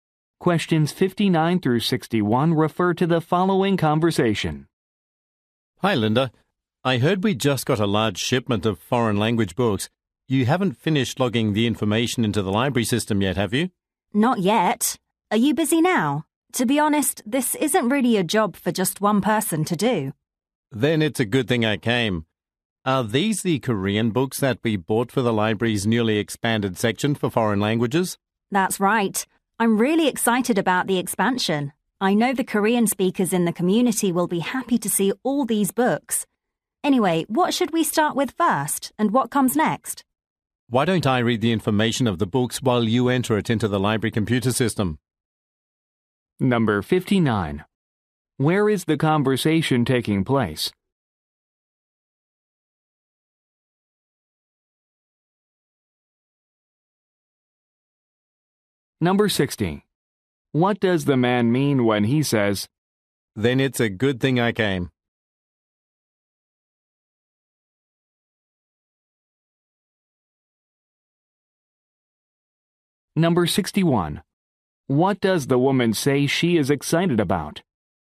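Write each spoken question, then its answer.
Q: Where is the conversation taking place?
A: In a library

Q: What does the woman say she is excited about?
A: The expansion of the foreign language section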